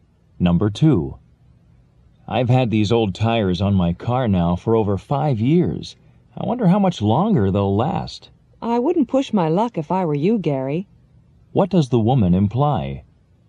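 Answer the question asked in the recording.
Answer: Gary should replace the tires soon rather than risk it.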